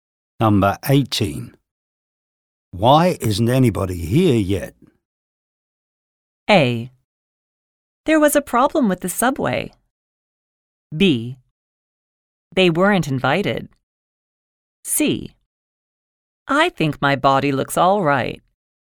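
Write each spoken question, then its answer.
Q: Why isn't anybody here yet?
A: A: There was a problem with the subway.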